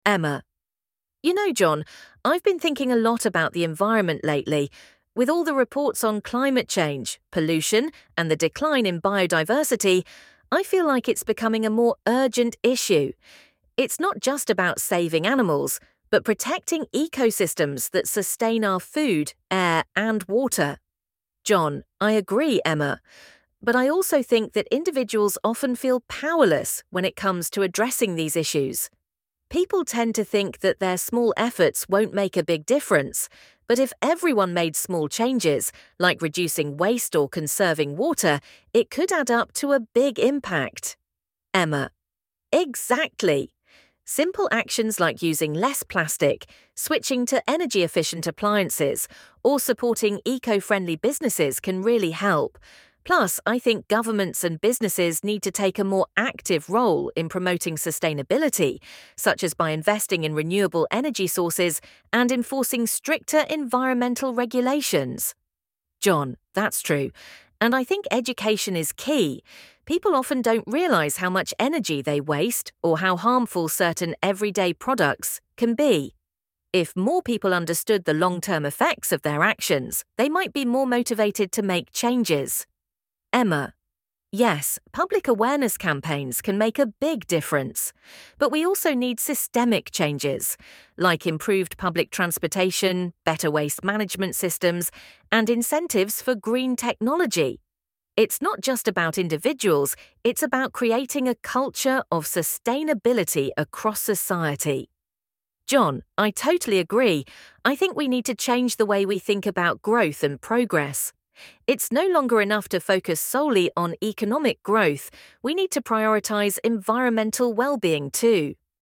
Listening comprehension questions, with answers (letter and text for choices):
Choose right answer:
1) What is the main topic of discussion between Emma and John?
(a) Economic growth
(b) Sustainability and protecting the environment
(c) Energy consumption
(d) Waste management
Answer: (b) Sustainability and protecting the environment

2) What does John think about individual efforts to protect the environment?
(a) He thinks they are pointless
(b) He believes they can make a big difference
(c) He is unsure about their impact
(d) He does not care about individual efforts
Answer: (b) He believes they can make a big difference

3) According to Emma, what actions can help protect the environment?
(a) Reducing plastic usage and conserving water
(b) Using more plastic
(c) Ignoring government policies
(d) Using more fossil fuels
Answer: (a) Reducing plastic usage and conserving water

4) What role does Emma believe governments and businesses should play?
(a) They should ignore environmental issues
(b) They should promote sustainability and invest in renewable energy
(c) They should focus on economic growth only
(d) They should encourage more pollution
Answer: (b) They should promote sustainability and invest in renewable energy

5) According to John, what is essential for encouraging people to make environmental changes?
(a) Education and public awareness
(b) Restricting personal freedoms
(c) Creating more jobs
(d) Reducing public transportation options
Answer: (a) Education and public awareness

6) What does Emma believe about the need for systemic changes?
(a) They are unnecessary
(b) They are essential for promoting sustainability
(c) They focus only on economic growth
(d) They should not be a priority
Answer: (b) They are essential for promoting sustainability

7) What does John believe about the concept of growth and progress?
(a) It should focus solely on economic growth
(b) It should prioritize environmental well-being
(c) It should ignore the environment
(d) It should only focus on technological advancements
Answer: (b) It should prioritize environmental well-being

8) According to the conversation, what is one of the key strategies for protecting the environment?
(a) Reducing awareness campaigns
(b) Creating more waste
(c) Educating the public and improving government policies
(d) Ignoring environmental concerns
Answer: (c) Educating the public and improving government policies